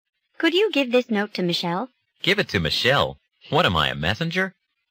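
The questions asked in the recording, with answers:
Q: What does the man imply?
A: He doesn't want to deliver the note; he isn't a messenger.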